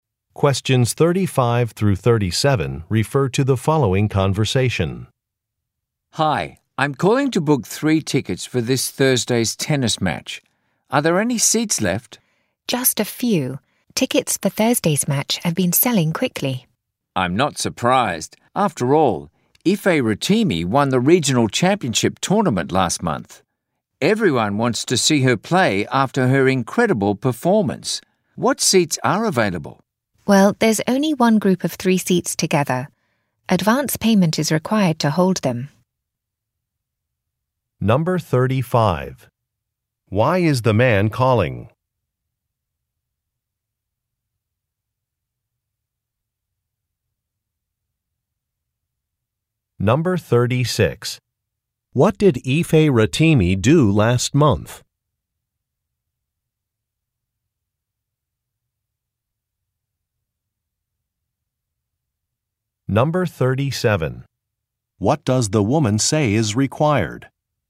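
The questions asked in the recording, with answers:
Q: Why is the man calling?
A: To book tickets for a tennis match

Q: What did Ife Rotimi do last month?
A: She won the regional championship tournament

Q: What does the woman say is required?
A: Advance payment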